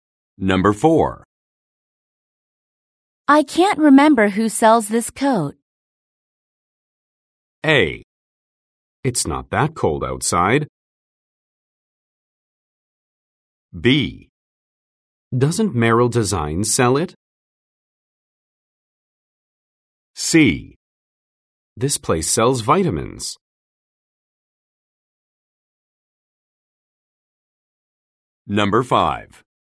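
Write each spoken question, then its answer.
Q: I can't remember who sells this coat.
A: B: Doesn't Merrill Design sell it?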